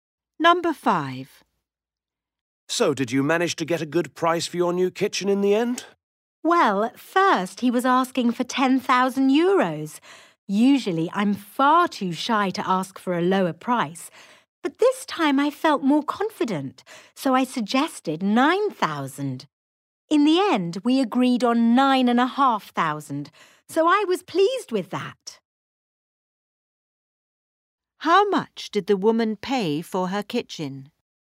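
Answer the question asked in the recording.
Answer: €9,500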